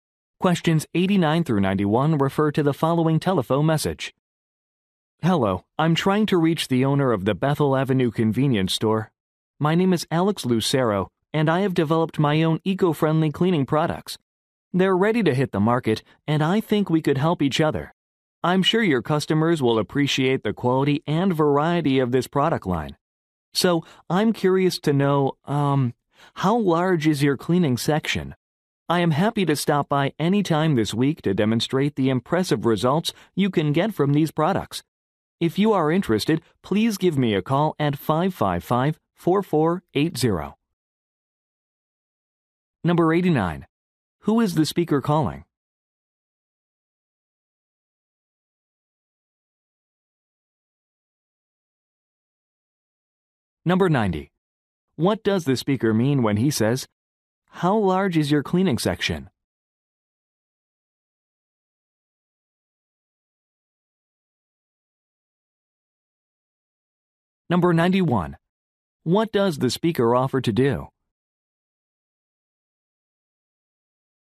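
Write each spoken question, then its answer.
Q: Who is the speaker calling?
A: The owner of a convenience store

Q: What does the speaker offer to do?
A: Stop by to demonstrate his products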